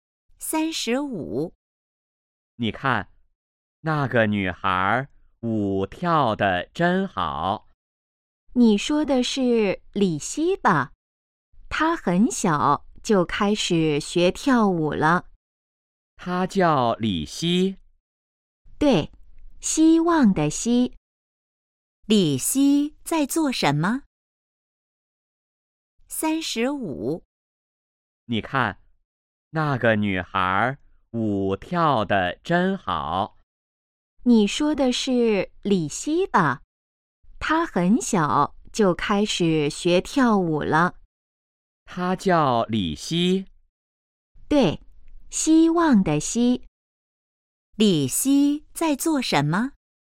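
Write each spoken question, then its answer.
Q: 李希在做什么?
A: 跳舞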